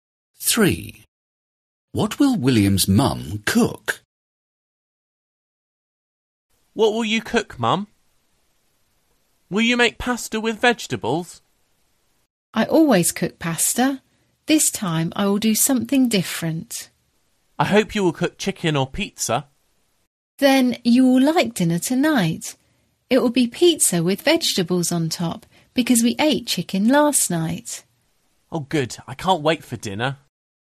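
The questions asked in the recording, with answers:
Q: What will William's mum cook?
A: pizza with vegetables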